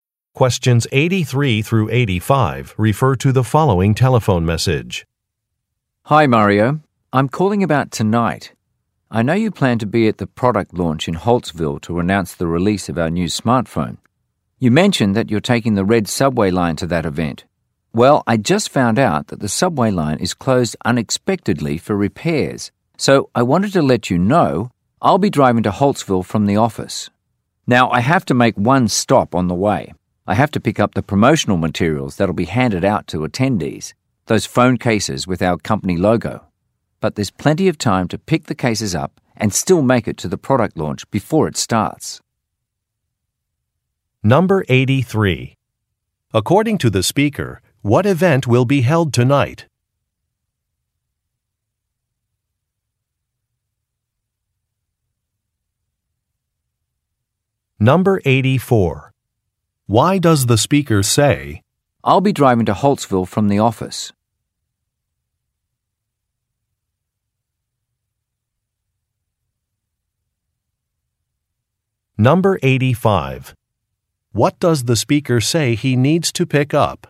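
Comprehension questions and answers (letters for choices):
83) According to the speaker, what event will be held tonight?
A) An anniversary party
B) A press conference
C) A board meeting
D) A product launch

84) Why does the speaker say, "I'll be driving to Holtsville from the office"?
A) To correct a mistake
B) To provide an excuse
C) To make an offer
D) To request directions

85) What does the speaker say he needs to pick up?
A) Some promotional materials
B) Some refreshments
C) Customer surveys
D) Event programs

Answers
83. D
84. C
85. A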